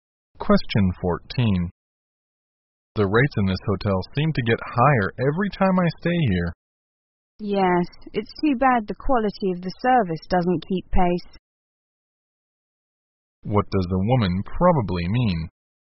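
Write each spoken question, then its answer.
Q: What does the woman probably mean?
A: The service hasn't improved as the rates have risen.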